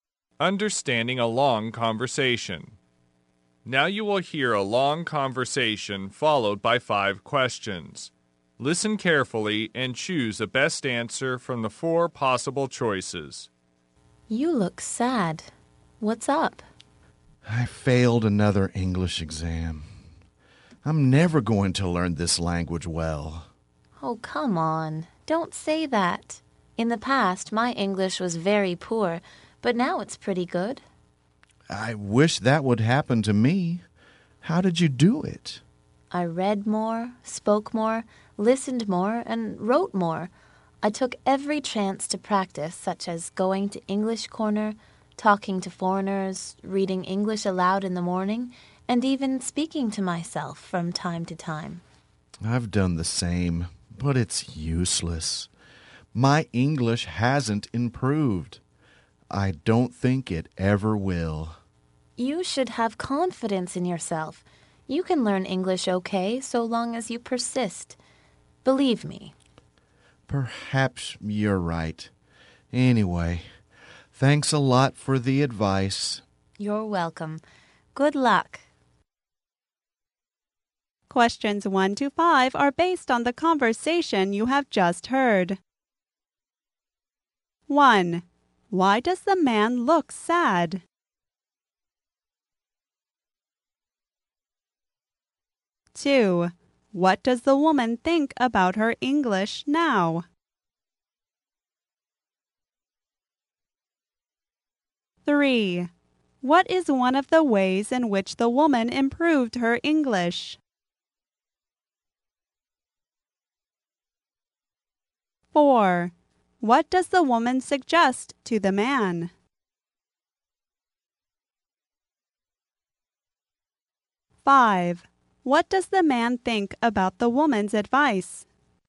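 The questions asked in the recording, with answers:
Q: Why does the man look sad?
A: He failed another English exam

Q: What does the woman think about her English now?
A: It is pretty good

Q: What is one of the ways in which the woman improved her English?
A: Going to English Corner (talking to foreigners, reading aloud)

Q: What does the woman suggest to the man?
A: Have confidence and persist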